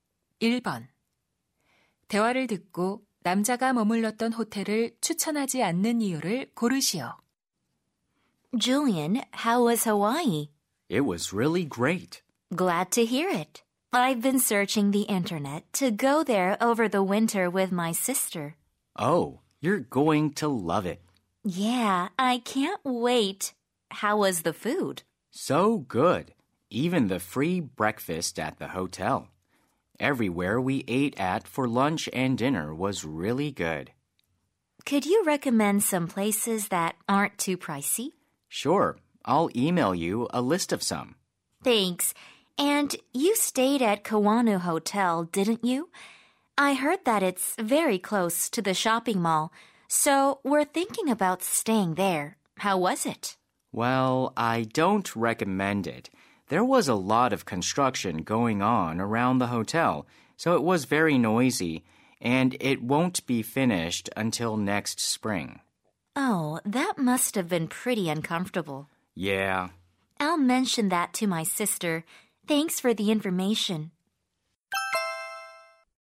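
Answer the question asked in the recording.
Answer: 호텔 주변 공사 때문에 매우 시끄러워서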